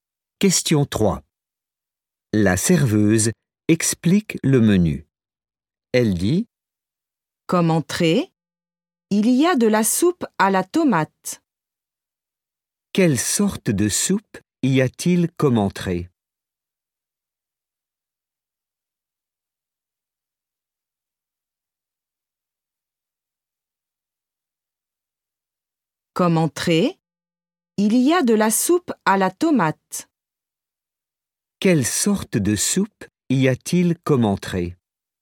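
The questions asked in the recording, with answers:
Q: Quelle sorte de soupe y a-t-il comme entrée?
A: de la soupe à la tomate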